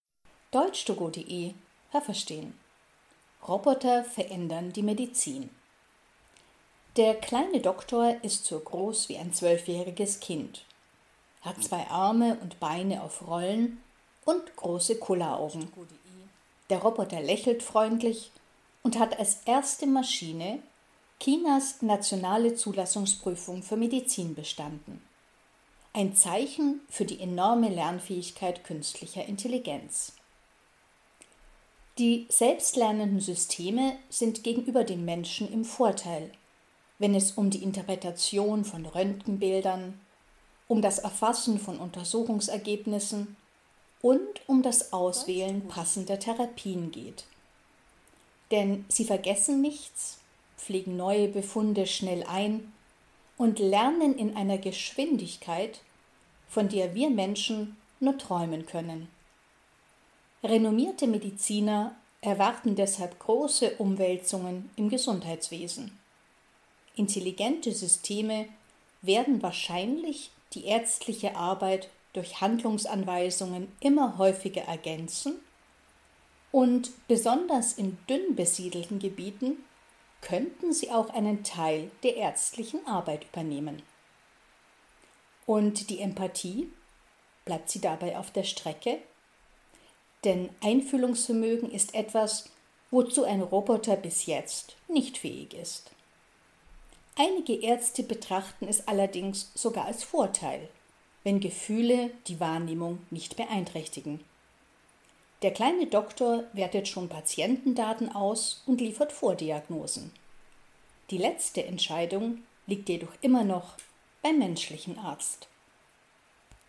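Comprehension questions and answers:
Welches Verb passt?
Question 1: Wenn es um das Erfassen von Untersuchungsergebnissen _____ , sind Computer im Vorteil.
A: geht

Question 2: Mediziner _____ große Umwälzungen im Gesundheitswesen.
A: erwarten

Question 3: _____ die Empathie auf der Strecke?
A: Bleibt

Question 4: Einige Ärzte _____ es als Vorteil, wenn Gefühle die Wahrnehmung nicht beeinträchtigen.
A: betrachten

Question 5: Computer können Patientendaten _____ .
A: auswerten

Haben Sie das gehört? Stimmt diese Aussage?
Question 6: Der „kleine Doktor" ist ein Roboter, der demnächst die nationale Zulassungsprüfung für Medizin in China absolvieren wird.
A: falsch

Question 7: Maschinen mit künstlicher Intelligenz können Röntgenbilder besser interpretieren als Menschen.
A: richtig

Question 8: Menschen können besser passende Therapien auswählen als Maschinen mit künstlicher Intelligenz.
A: falsch

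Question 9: Intelligente Systeme lernen schnell, vergessen nichts und können neue Ergebnisse medizinischer Untersuchungen rasch einarbeiten.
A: richtig

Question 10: Selbstlernende Systeme ersetzen schon jetzt vollständig die Arbeit der Ärzte.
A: falsch

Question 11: Die fehlende Empathie bei Robotern kann auch ein Vorteil sein.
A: richtig

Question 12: Der „kleine Doktor" liefert zwar erste Diagnosen, aber er trifft nicht die letzte Entscheidung.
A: richtig

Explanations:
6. Dieser Roboter hat die Zulassungsprüfung für Medizin bereits bestanden.
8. Auch das können Roboter besser.
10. Bis jetzt ergänzen sie die ärztliche Arbeit durch Handlungsanweisungen oder übernehmen Teilaufgaben.
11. Denn die Wahrnehmung wird nicht durch Gefühle beeinträchtigt.

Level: Hörtexte C (schwer)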